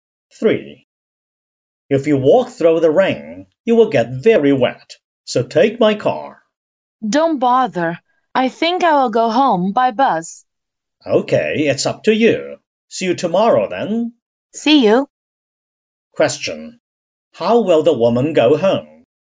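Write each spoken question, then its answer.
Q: How will the woman go home?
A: By bus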